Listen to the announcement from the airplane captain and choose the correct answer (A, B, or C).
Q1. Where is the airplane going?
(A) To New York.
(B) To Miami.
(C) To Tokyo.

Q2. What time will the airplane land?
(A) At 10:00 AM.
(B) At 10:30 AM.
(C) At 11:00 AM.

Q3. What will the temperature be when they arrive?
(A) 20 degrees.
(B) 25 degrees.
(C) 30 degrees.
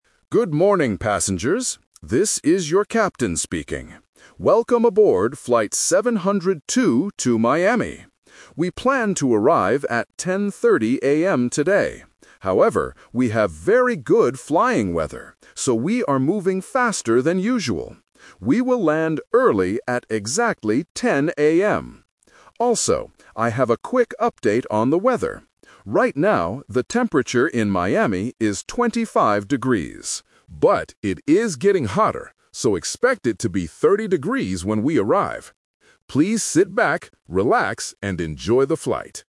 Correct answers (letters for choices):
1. B
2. A
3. C

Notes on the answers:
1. The captain clearly says, "Welcome aboard Flight 702 to Miami." Options (A) and (C) are plausible destinations but are never mentioned in the audio.
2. This question uses "The Twist". The captain says they "planned to arrive at 10:30 AM" (Option B - The Trap), but because of good weather, they are faster. His final statement is: "We will land early at exactly 10:00 AM." Option (C) is not mentioned.
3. This is another "Twist". The captain says the temperature is "25 degrees" right now (Option B - The Trap). But he warns that it is getting hotter, so it will be "30 degrees when we arrive." Option (A) is not mentioned.

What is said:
Captain: Good morning, passengers. This is your captain speaking. Welcome aboard Flight 702 to Miami. We planned to arrive at 10:30 AM today. However, we have very good flying weather, so we are moving faster than usual. We will land early at exactly 10:00 AM. Also, I have a quick update on the weather. Right now, the temperature in Miami is 25 degrees. But it is getting hotter, so expect it to be 30 degrees when we arrive. Please sit back, relax, and enjoy the flight.

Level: A2